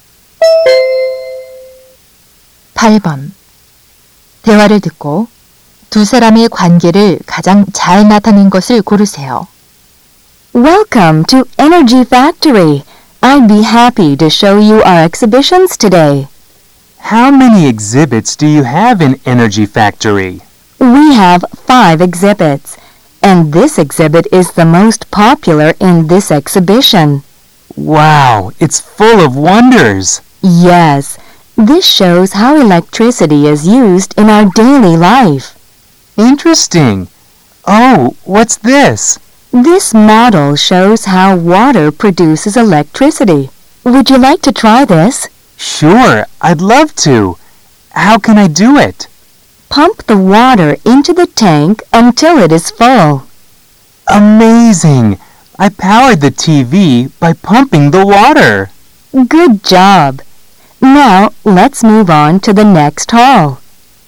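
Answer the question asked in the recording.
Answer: 전시관 안내원 - 관람객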